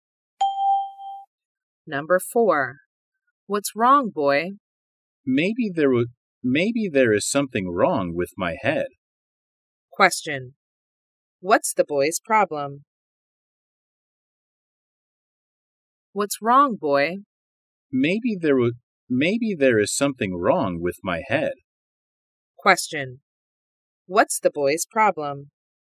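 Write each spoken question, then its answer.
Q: What's the boy's problem?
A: Something is wrong with his head.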